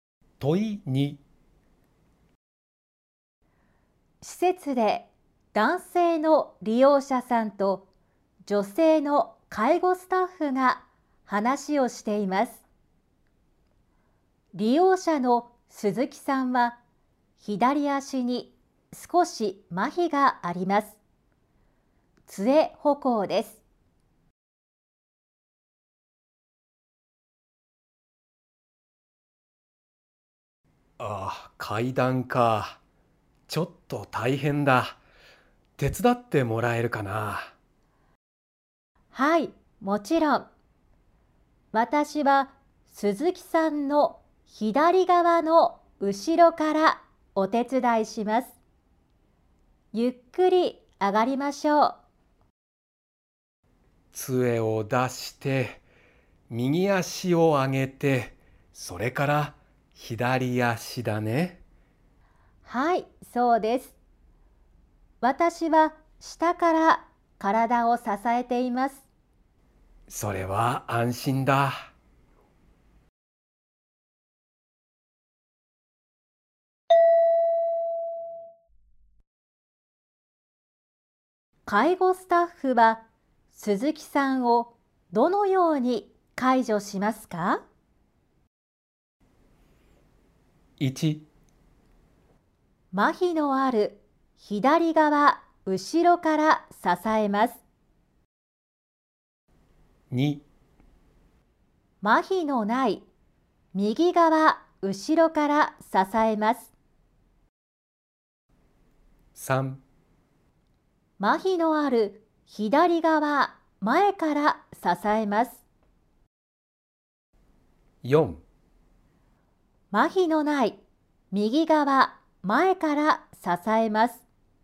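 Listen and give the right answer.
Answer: 1: 麻痺のある左側後ろから支えます。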